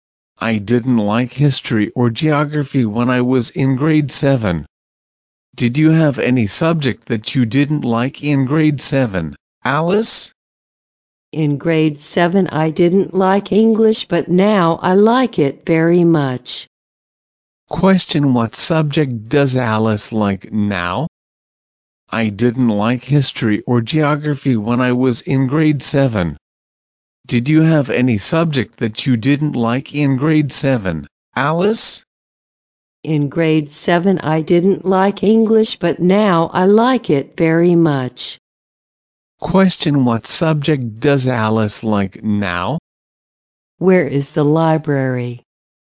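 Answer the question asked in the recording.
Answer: English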